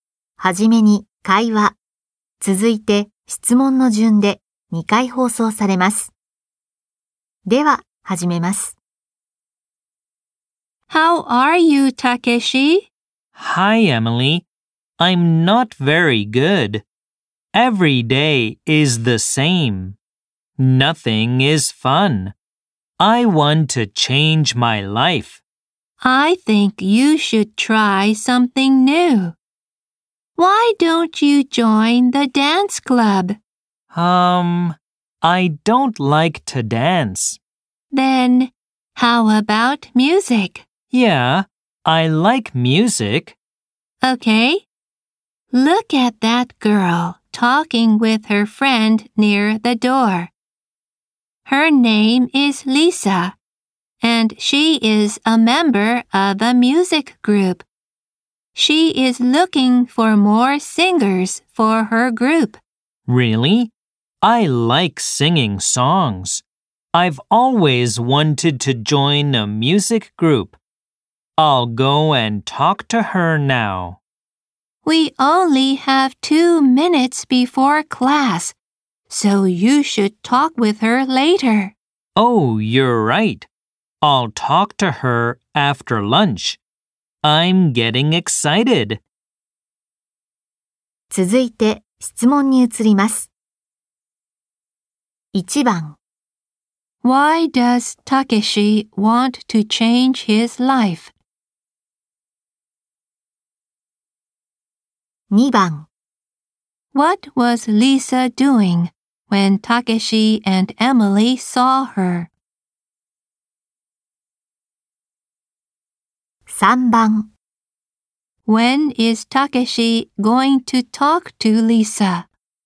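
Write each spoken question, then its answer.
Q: Why does Takeshi want to change his life?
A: Because every day is the same and nothing is fun.

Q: What was Lisa doing when Takeshi and Emily saw her?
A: She was talking with her friend near the door.

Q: When is Takeshi going to talk to Lisa?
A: After lunch.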